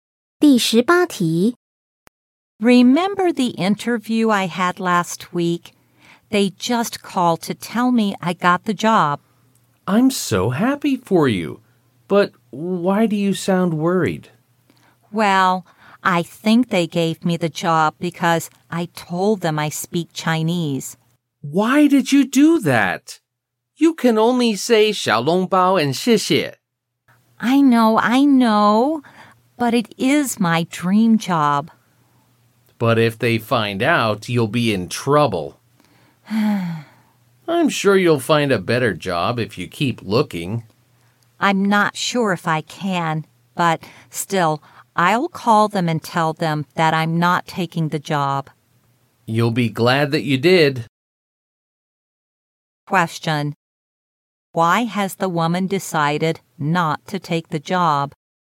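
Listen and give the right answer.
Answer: She lied that she speaks Chinese, but she can't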